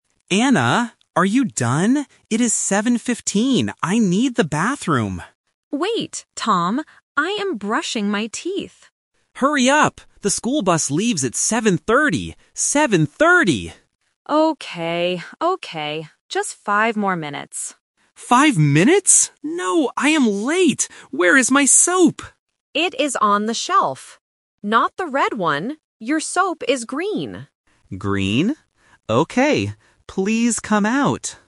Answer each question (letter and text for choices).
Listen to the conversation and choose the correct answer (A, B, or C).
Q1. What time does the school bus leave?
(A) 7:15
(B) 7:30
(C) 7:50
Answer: (B) 7:30

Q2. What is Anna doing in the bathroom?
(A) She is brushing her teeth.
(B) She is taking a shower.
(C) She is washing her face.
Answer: (A) She is brushing her teeth.

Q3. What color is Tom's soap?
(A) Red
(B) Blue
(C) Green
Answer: (C) Green

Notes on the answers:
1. Tom says, "The school bus leaves at 7:30". He also repeats "Seven thirty!" to make it clear. The Trap (A): 7:15 is mentioned, but it is the current time ("It is 7:15!"), not the time the bus leaves. (C) is plausible because 50 sounds similar to 15, but it is not mentioned.
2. Anna clearly says, "I am brushing my teeth." The Trap (B & C): Taking a shower and washing the face are common bathroom activities (plausible), but they are not mentioned in the audio.
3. Anna tells Tom, "your soap is green" and spells the word "G-R-E-E-N". Tom also repeats the word "Green?". The Trap (A): The color "red" is mentioned ("Not the red one"), but it is the wrong soap. (B) is a plausible color but not mentioned.

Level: A1